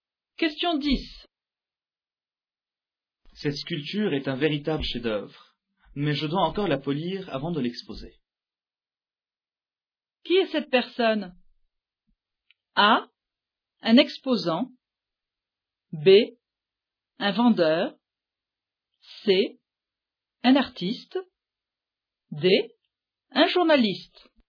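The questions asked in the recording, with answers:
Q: Qui est cette personne?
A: C: Un artiste.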